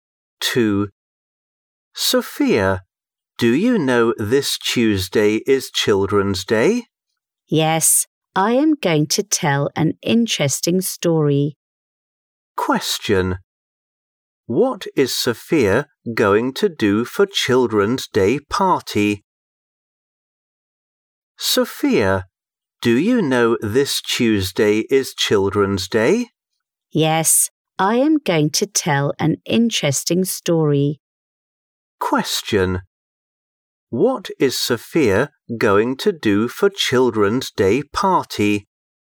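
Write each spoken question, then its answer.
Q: What is Sophia going to do for Children's Day party?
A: Tell an interesting story.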